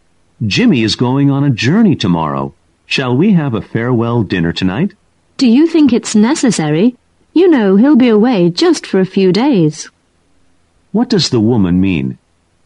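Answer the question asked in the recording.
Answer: A farewell dinner is unnecessary because Jimmy will only be away a few days.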